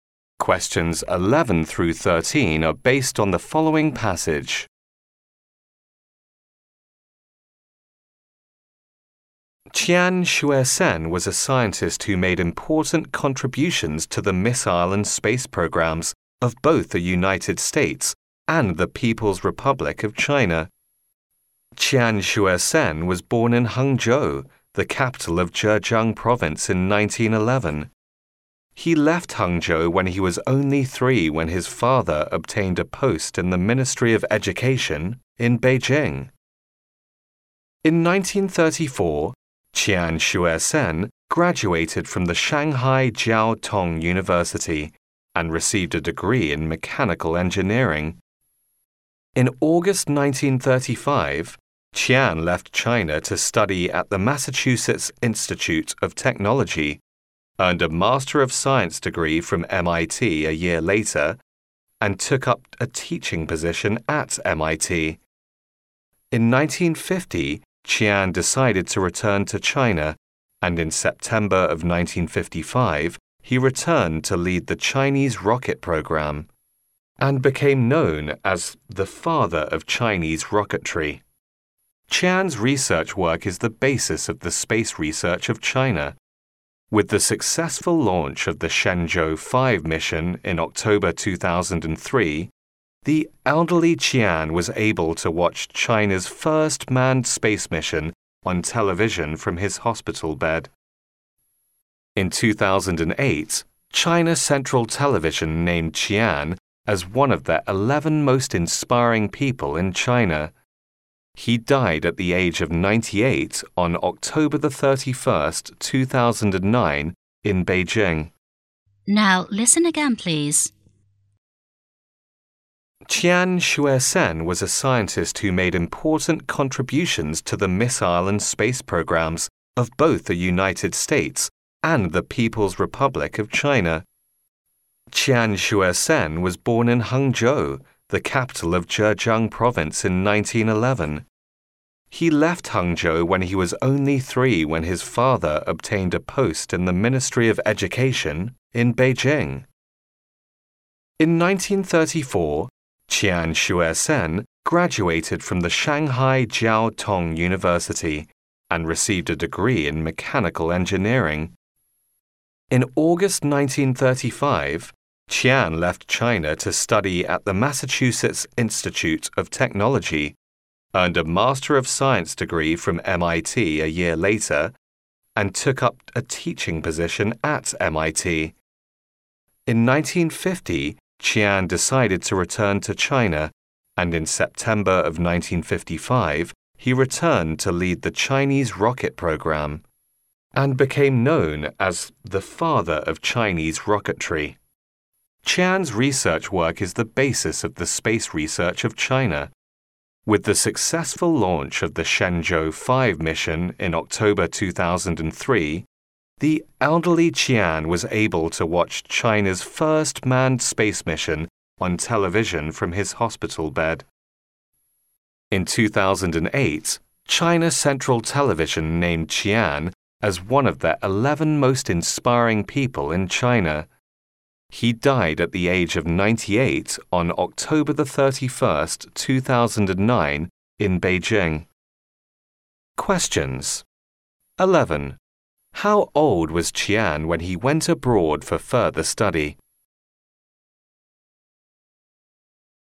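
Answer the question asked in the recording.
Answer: 24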